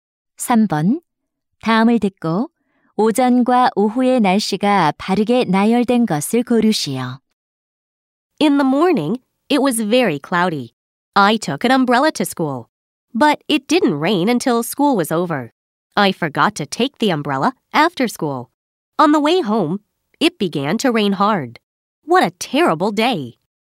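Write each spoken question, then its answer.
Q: 다음을 듣고 오전과 오후의 날씨가 바르게 나열된 것을 고르시오.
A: 오전: 흐림, 오후: 비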